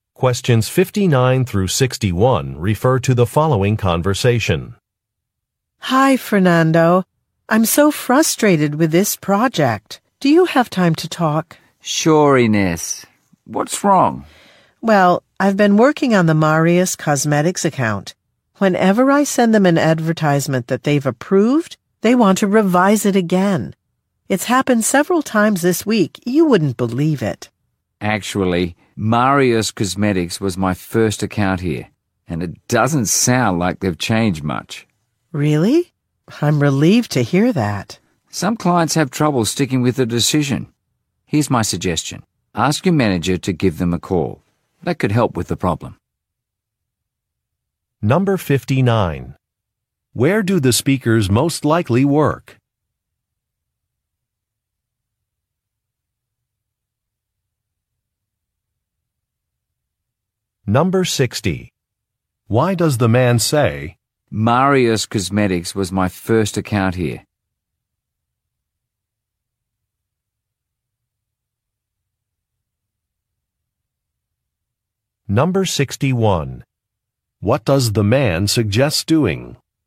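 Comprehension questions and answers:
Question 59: Where do the speakers most likely work?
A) At a department store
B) At an accounting firm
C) At a law firm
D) At an advertising agency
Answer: D) At an advertising agency

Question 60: Why does the man say, "Marius Cosmetics was my first account here"?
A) To show that he understands a problem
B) To explain that he no longer works with a client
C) To complain about a coworker's mistake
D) To request a promotion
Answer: A) To show that he understands a problem

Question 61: What does the man suggest doing?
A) Rejecting a proposal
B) Getting help from a manager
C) Preparing some samples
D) Revising a budget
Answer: B) Getting help from a manager

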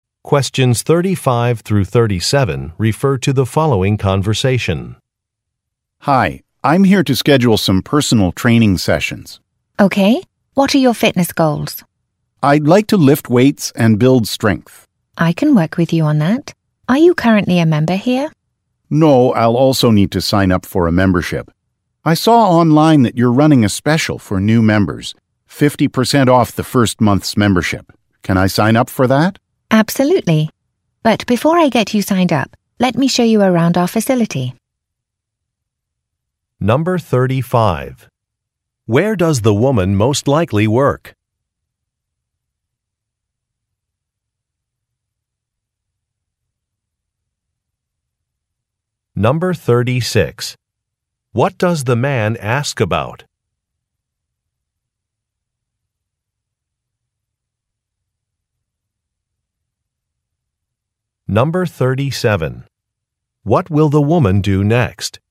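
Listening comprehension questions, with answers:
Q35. Where does the woman most likely work?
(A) At a sports stadium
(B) At a fitness center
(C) At a doctor's office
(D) At a library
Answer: (B) At a fitness center

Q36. What does the man ask about?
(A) A discount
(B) A form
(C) A business location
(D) A parking policy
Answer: (A) A discount

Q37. What will the woman do next?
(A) Post a sign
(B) Confirm an account number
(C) Provide a tour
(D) Look at a schedule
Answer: (C) Provide a tour

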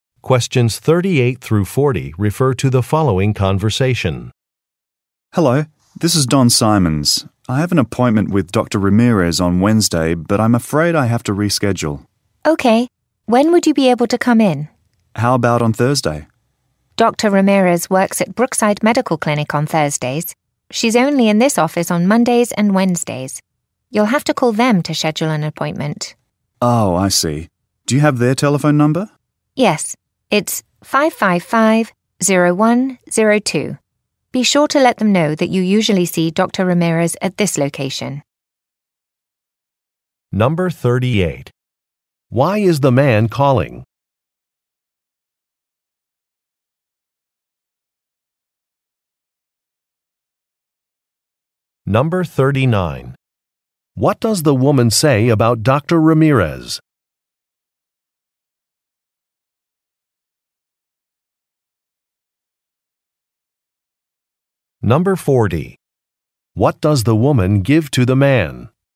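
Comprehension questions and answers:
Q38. Why is the man calling?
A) To inquire about a job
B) To request a prescription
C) To ask about business hours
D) To reschedule an appointment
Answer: D) To reschedule an appointment

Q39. What does the woman say about Dr. Ramirez?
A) She is presenting at a conference next week.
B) She works at two different locations.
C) She teaches at a medical school.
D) She usually does not work on Wednesdays.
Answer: B) She works at two different locations.

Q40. What does the woman give to the man?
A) Directions to a medical center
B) A Web site address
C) A phone number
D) A cost estimate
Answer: C) A phone number

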